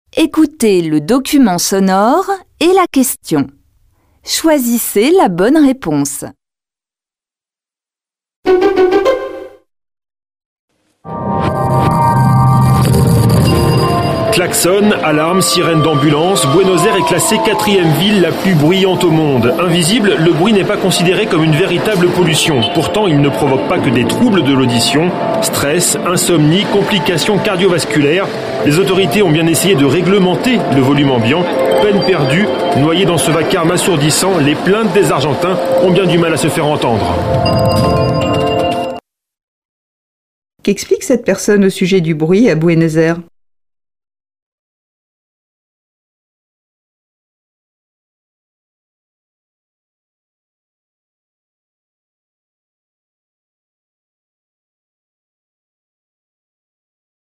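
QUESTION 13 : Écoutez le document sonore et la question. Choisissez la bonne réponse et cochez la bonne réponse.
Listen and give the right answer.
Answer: Le bruit n'est pas considéré comme une vraie pollution malgré ses effets sur la santé, et les plaintes sont peu entendues.

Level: Tăng dần từ trình độ A1 đến C1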